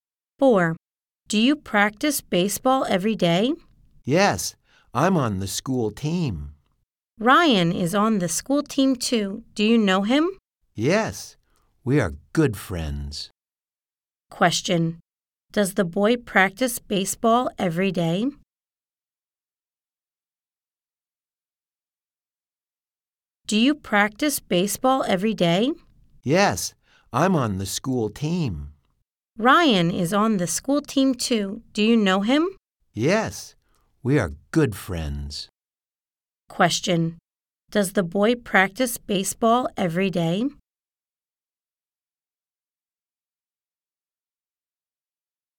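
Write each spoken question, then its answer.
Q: Does the boy practice baseball every day?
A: Yes, he does.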